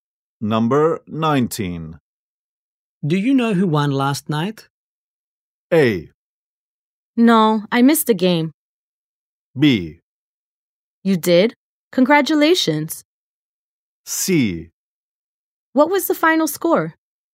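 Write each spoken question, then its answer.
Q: Do you know who won last night?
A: A: No, I missed the game.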